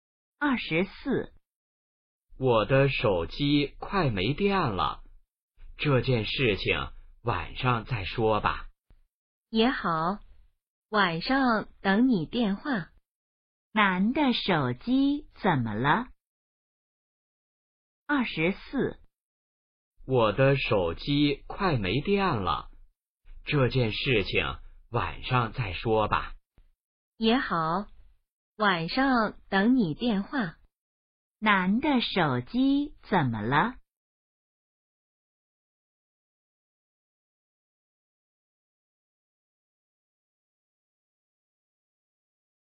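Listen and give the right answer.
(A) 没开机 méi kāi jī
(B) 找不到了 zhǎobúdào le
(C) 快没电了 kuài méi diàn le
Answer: (C) 快没电了 kuài méi diàn le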